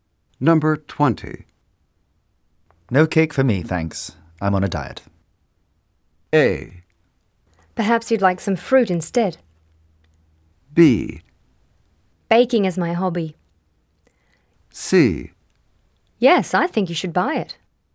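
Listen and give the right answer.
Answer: A: Perhaps you'd like some fruit instead.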